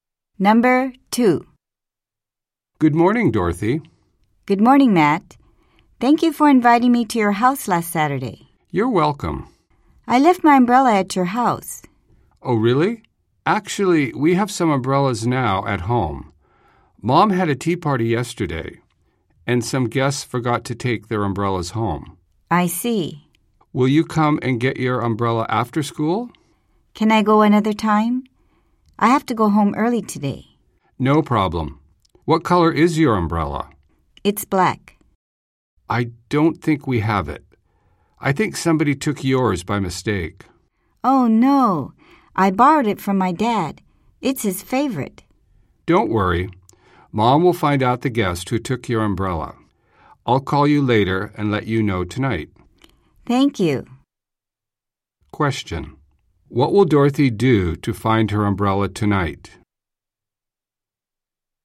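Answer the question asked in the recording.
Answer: Wait for Matt's call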